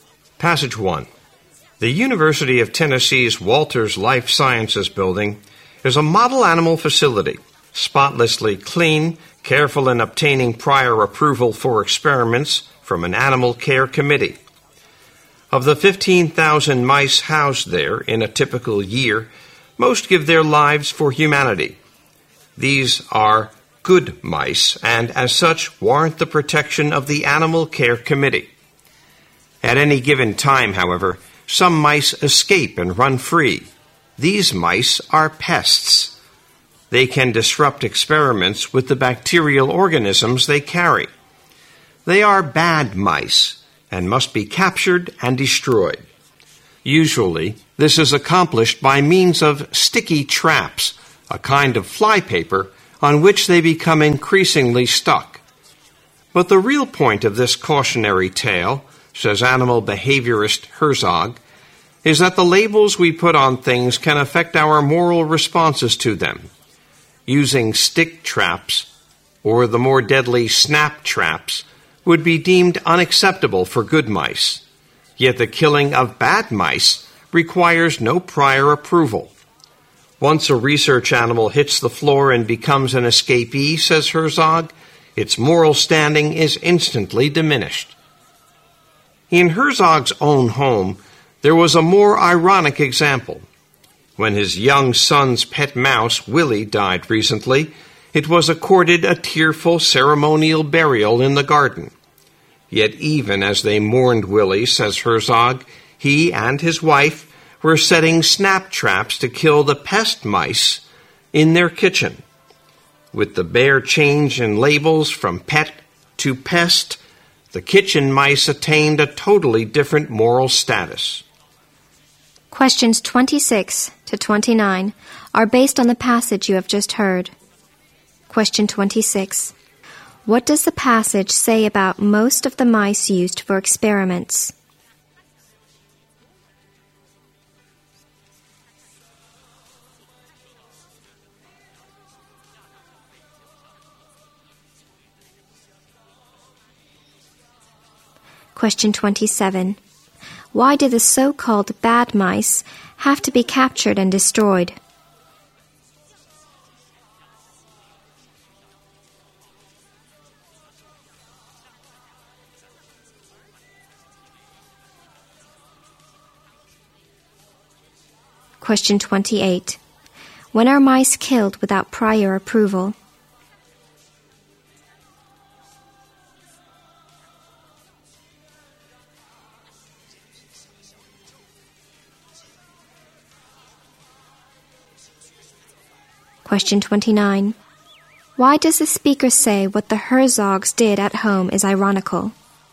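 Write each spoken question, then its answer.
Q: What does the passage say about most of the mice used for experiments?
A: Most of them give their lives for humanity.

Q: Why do the so-called bad mice have to be captured and destroyed?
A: They can disrupt experiments with the bacteria they carry.

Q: When are mice killed without prior approval?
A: When they have escaped from the lab and become pests.

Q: Why does the speaker say what the Herzogs did at home is ironical?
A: They mourned their son's dead pet mouse while setting traps to kill the mice in their kitchen.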